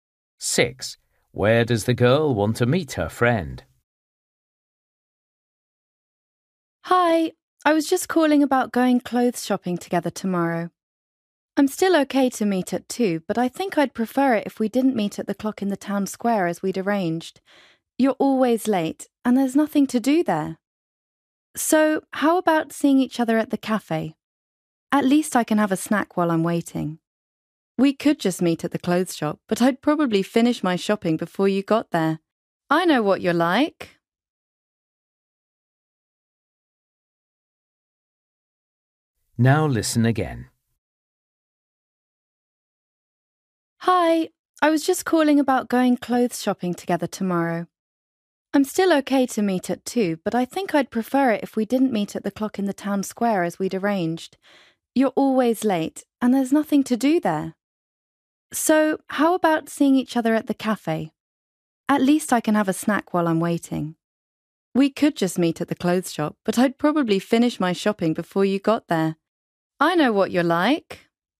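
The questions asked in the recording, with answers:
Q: Where does the girl want to meet her friend?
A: At the cafe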